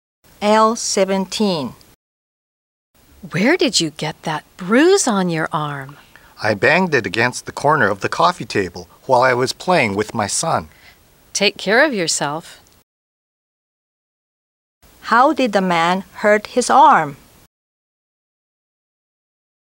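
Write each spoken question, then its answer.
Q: How did the man hurt his arm?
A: He hit it on the corner of the coffee table while playing with his son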